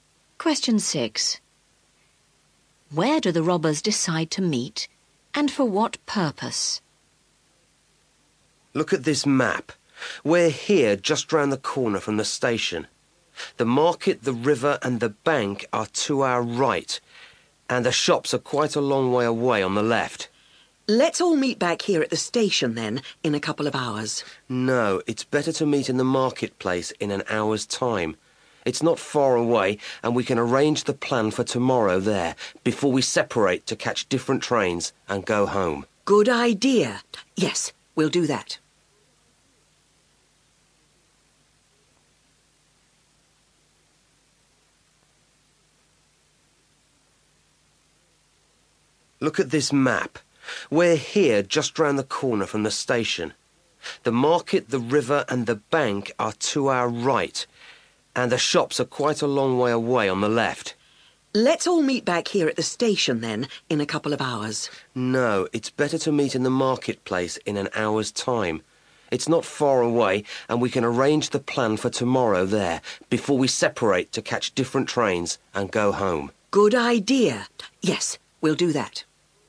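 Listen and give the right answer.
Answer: In the marketplace, to arrange the plan for tomorrow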